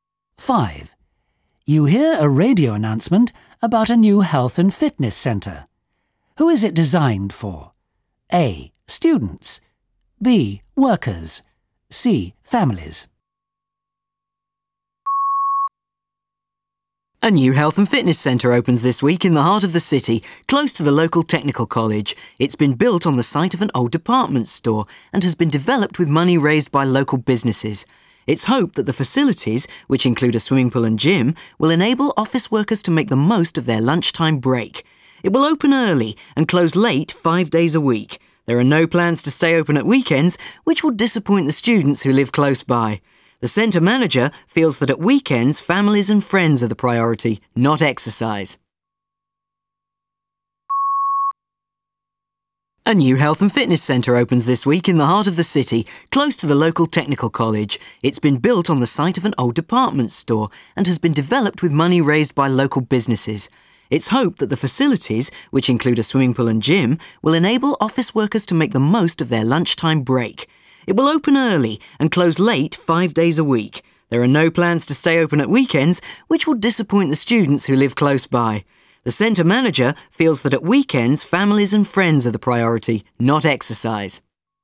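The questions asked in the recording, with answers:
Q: Who is it designed for? A. Students. B. Workers. C. Families.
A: B: Workers.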